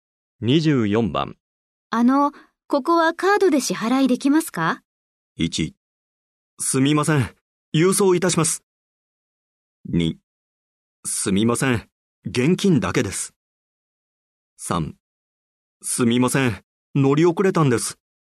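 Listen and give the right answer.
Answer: 2: すみません。現金だけです。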